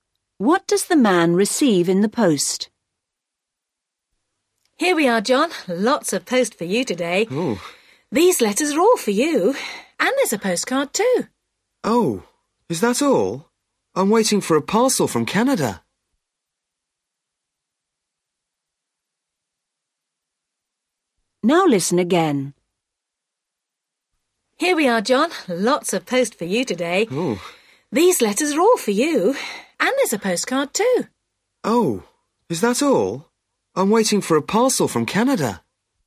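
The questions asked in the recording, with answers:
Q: What does the man receive in the post?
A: letters and a postcard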